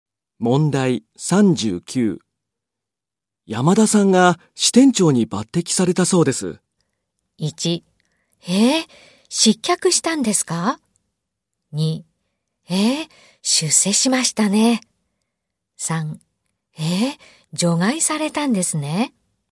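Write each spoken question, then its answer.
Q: 山田さんが支店長に抜擢されたそうです。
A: 2: 出世しましたね。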